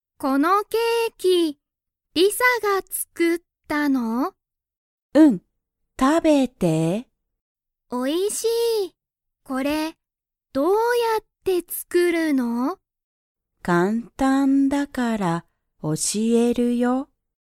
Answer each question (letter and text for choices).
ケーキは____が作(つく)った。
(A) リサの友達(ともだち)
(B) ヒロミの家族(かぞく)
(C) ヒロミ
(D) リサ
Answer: (D) リサ

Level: Level 1